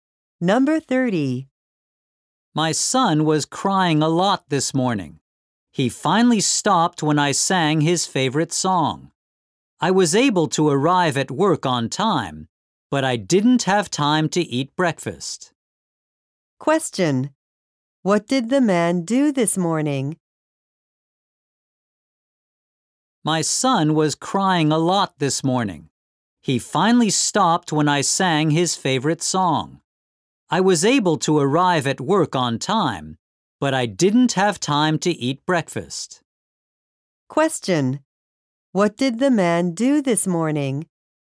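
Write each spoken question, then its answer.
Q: What did the man do this morning?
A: He sang his son's favorite song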